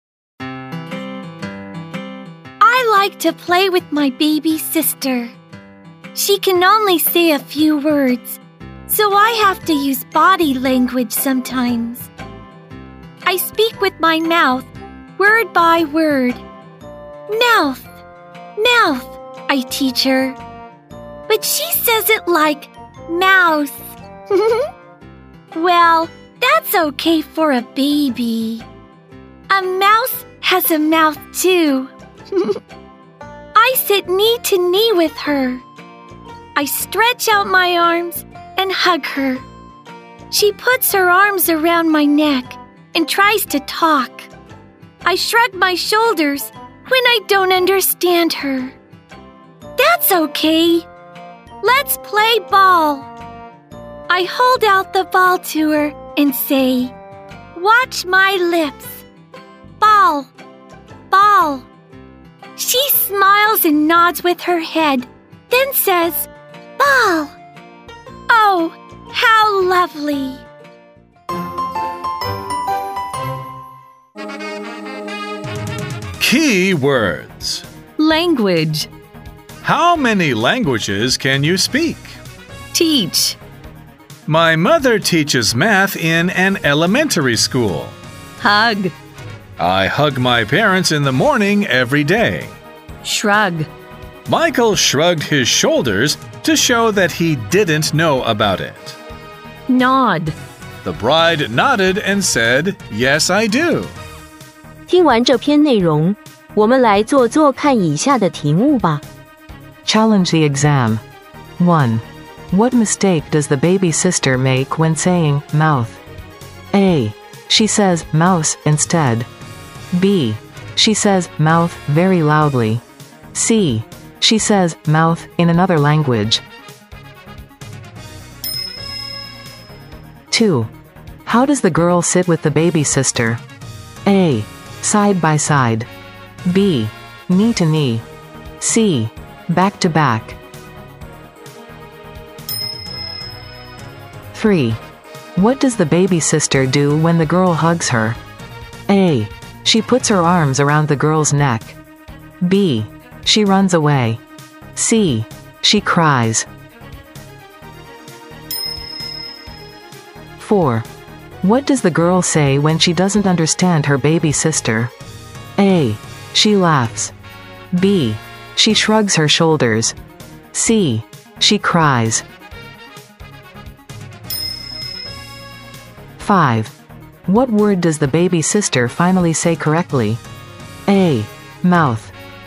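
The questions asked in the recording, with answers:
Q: What mistake does the baby sister make when saying mouth?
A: A: She says mouse instead.

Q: How does the girl sit with the baby sister?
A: B: Knee to knee.

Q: What does the baby sister do when the girl hugs her?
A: A: She puts her arms around the girl's neck.

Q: What does the girl say when she doesn't understand her baby sister?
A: B: She shrugs her shoulders.

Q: What word does the baby sister finally say correctly?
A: B: Ball.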